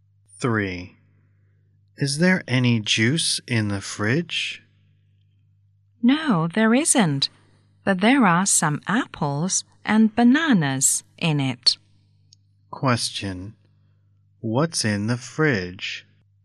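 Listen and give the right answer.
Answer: Some apples and bananas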